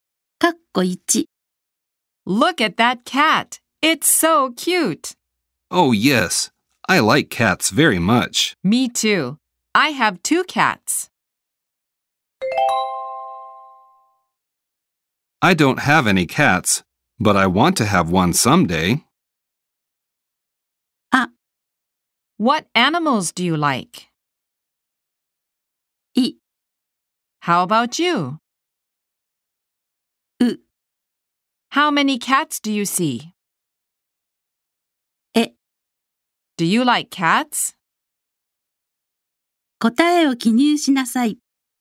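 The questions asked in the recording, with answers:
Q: Me too. I have 2 cats.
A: い: How about you?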